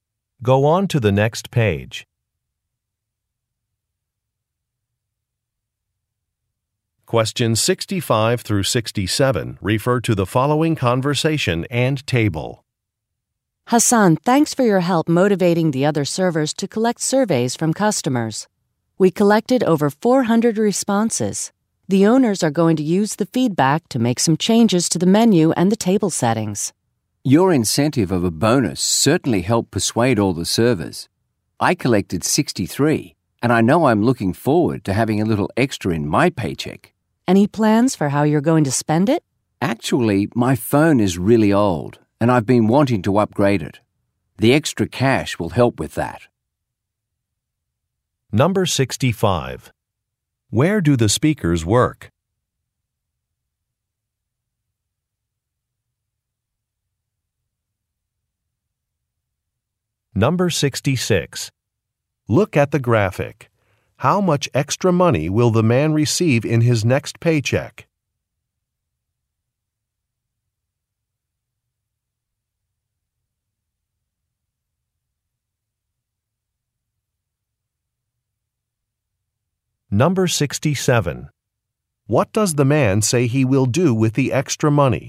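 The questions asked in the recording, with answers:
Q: Where do the speakers work?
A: At a restaurant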